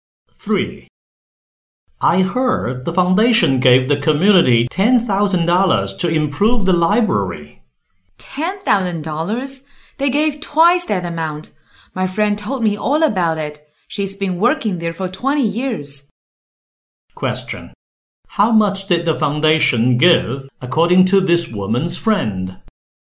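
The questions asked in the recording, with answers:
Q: How much did the foundation give according to this woman's friend?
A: $20,000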